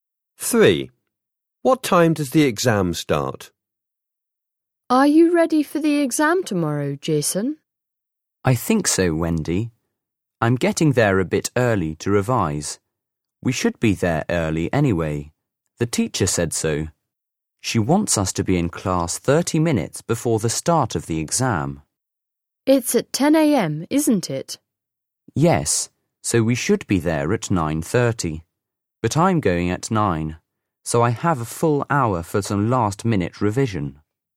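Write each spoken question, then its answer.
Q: What time does the exam start?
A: 10 a.m.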